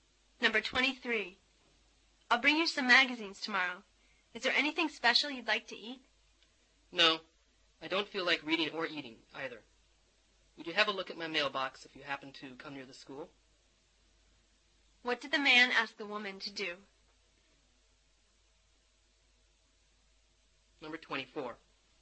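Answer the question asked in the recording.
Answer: Check his mailbox.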